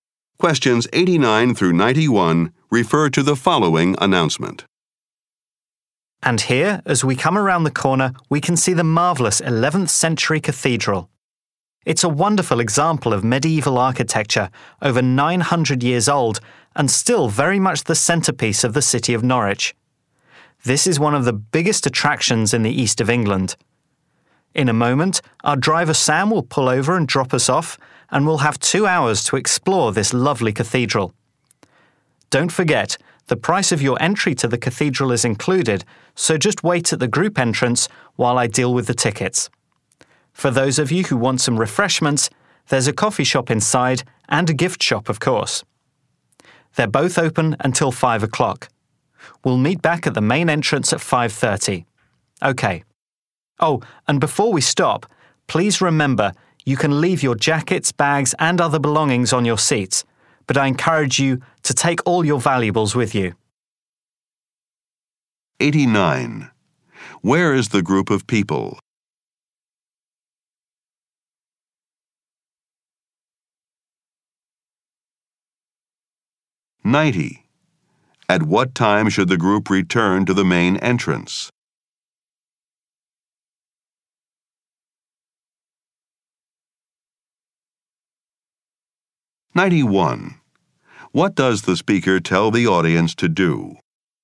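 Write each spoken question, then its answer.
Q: Where is the group of people?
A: On a tour bus arriving at Norwich Cathedral

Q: At what time should the group return to the main entrance?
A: 5:30

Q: What does the speaker tell the audience to do?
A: Take their valuables with them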